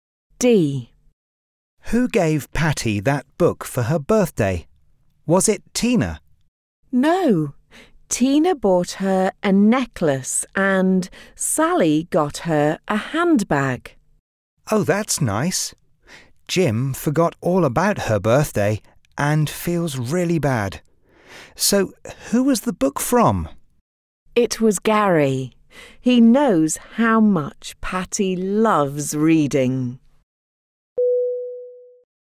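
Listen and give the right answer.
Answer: Gary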